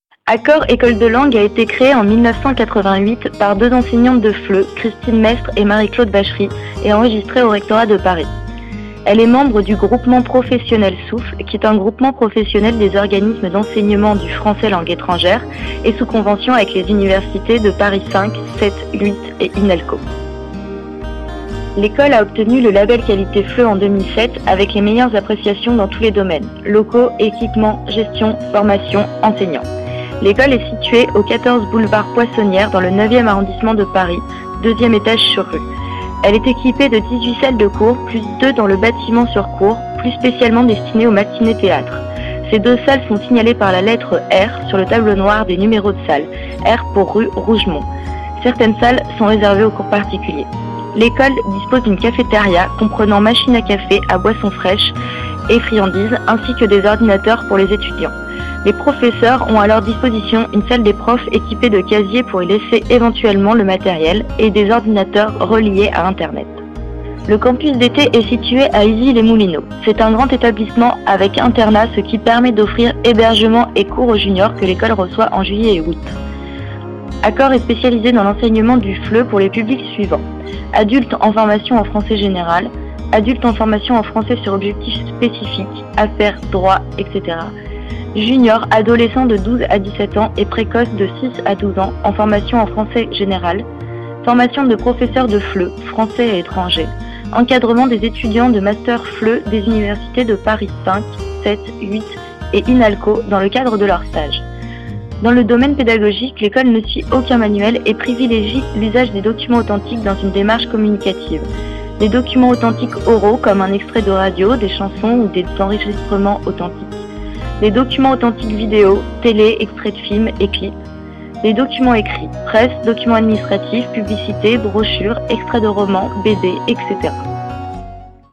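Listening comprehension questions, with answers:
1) Où se situe le centre FLE ? (essayez l'adresse complète)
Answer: 14 boulevard Poissonnière, 9e arrondissement de Paris, 2e étage sur rue

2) Par qui le centre a-t-il été fondé ?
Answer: Par deux enseignantes de FLE, Christine Mestre et Marie-Claude Bachery

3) Pourquoi y a-t-il marqué « R » pour certaines salles ?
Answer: R pour rue Rougemont

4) Avec quelles universités, le centre FLE est-il lié ?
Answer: Paris 5, 7, 8 et INALCO

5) Pourquoi a-t-il reçu le Label Qualité FLE ?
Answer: Pour les meilleures appréciations dans tous les domaines : locaux, équipements, gestion, formation, enseignants

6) De quoi disposent les professeurs dans l'école ?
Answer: D'une salle des profs avec casiers et ordinateurs reliés à Internet

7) Où se trouve le campus d'été ? Et à quelle période se déroule-t-il ?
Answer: À Issy-les-Moulineaux, en juillet et août

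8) Quelle est la méthode utilisée par l'école ?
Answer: Aucun manuel ; documents authentiques dans une démarche communicative

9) Donnez des exemples de documents authentiques vidéo utilisés à l'école ?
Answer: Télé, extraits de films et clips

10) A quel âge peut-on commencer la formation ?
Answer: À 6 ans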